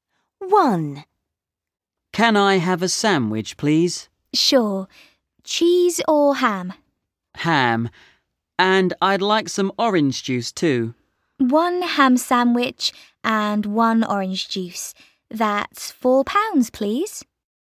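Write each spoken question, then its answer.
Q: Where are they?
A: At a café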